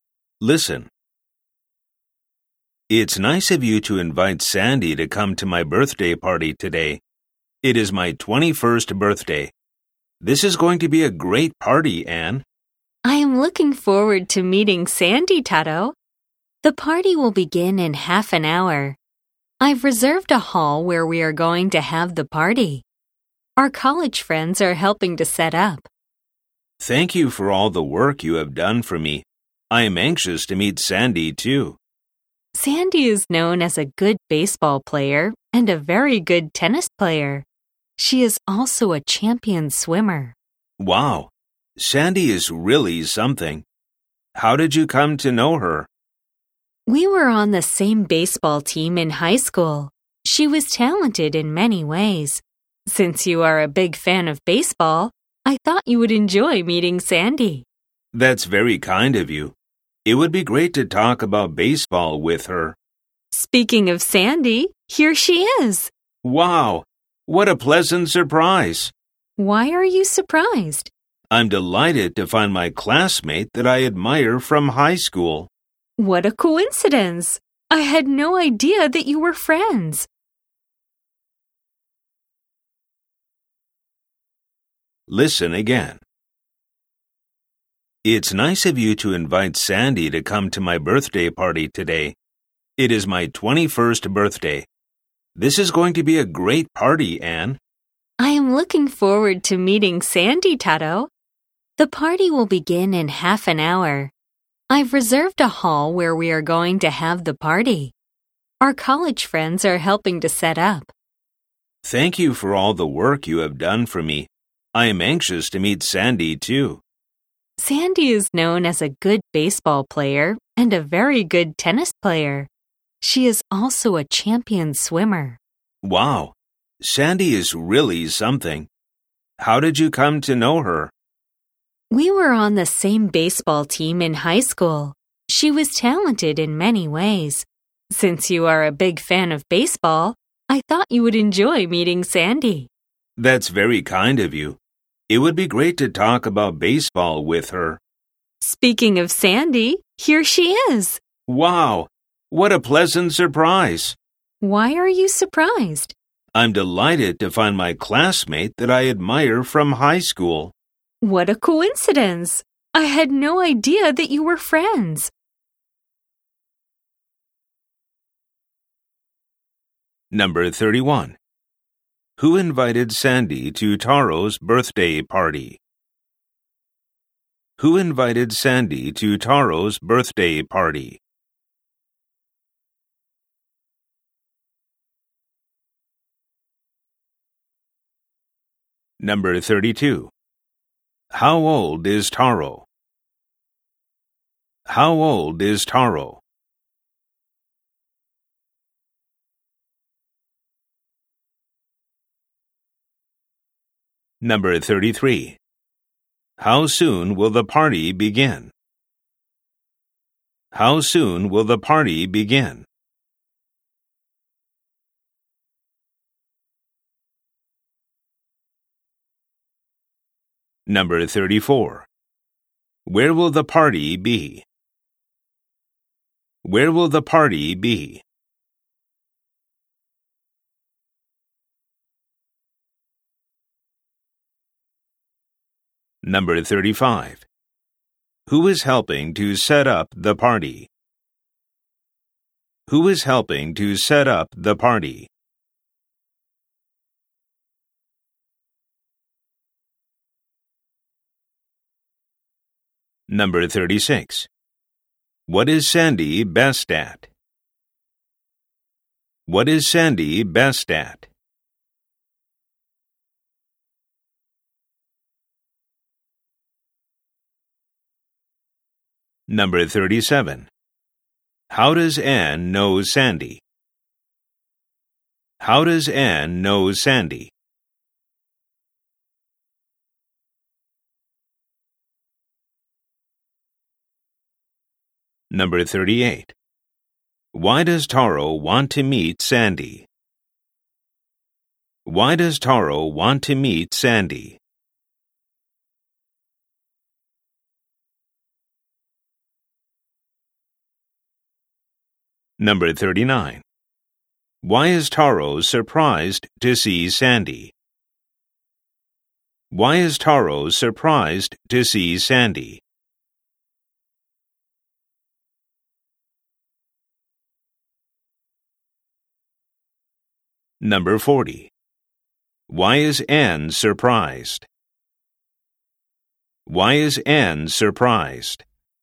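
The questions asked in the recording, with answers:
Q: Who invited Sandy to Taro's birthday party?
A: Anne.

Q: How old is Taro?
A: 21.

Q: How soon will the party begin?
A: In half an hour.

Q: Where will the party be?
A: In a hall Anne reserved.

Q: Who is helping to set up the party?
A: Their college friends.

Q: How does Anne know Sandy?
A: They were on the same baseball team in high school.

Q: Why does Taro want to meet Sandy?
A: He is a big baseball fan and wants to talk about baseball with her.

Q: Why is Taro surprised to see Sandy?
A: She is a high school classmate he admires.

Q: Why is Anne surprised?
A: She had no idea Taro and Sandy were friends.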